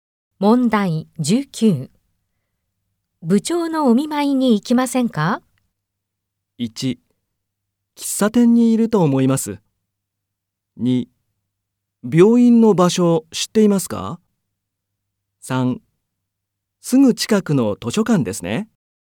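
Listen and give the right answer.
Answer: 2: 病院の場所知っていますか?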